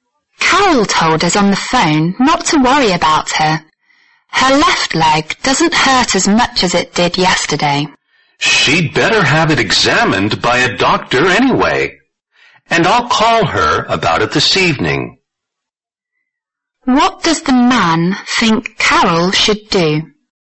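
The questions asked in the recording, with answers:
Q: What does the man think Carol should do?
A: Have her leg examined by a doctor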